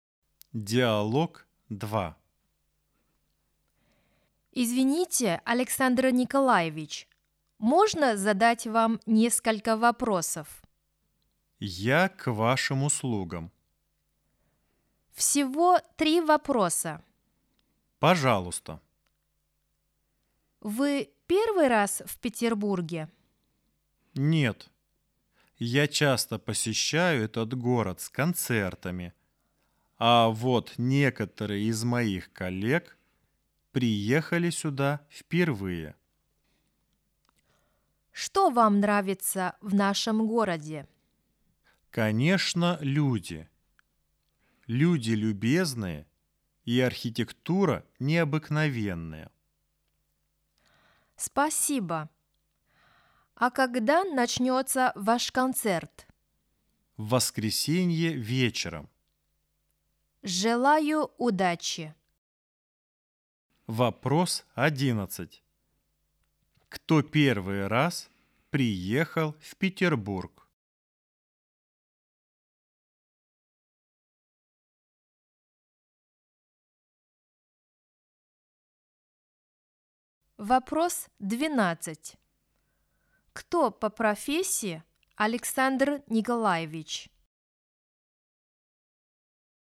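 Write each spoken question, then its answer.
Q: Кто первый раз приехал в Петербург?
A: некоторые коллеги Александра Николаевича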